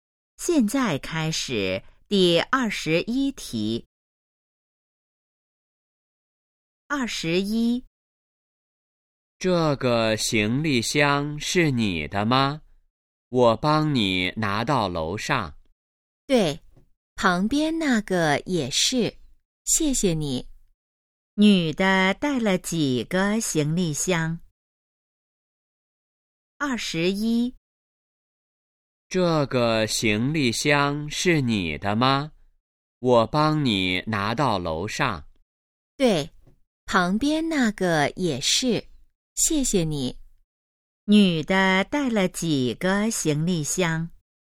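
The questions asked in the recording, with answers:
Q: 女的带了几个行李箱?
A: 两个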